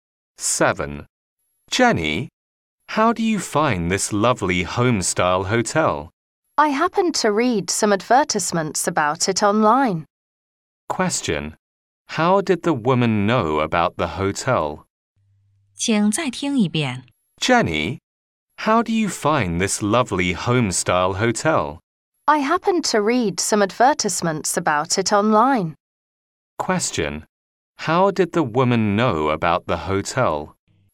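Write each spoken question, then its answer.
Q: How did the woman know about the hotel?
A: From online advertisements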